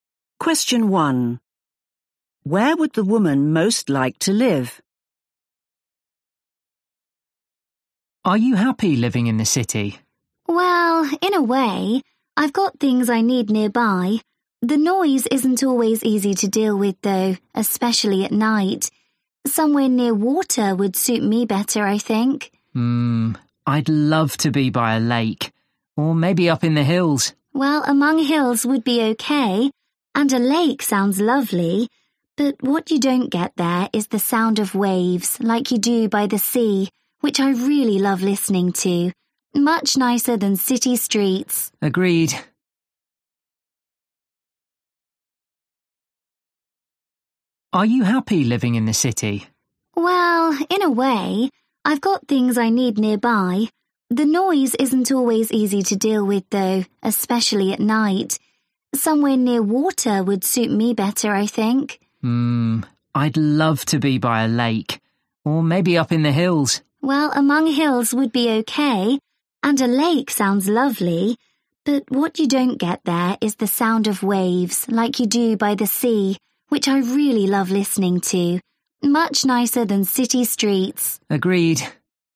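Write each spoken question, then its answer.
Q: Where would the woman most like to live?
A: by the sea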